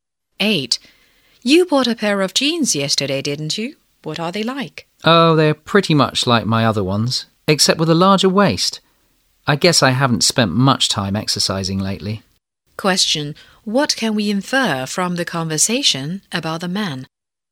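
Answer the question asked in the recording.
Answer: He has put on weight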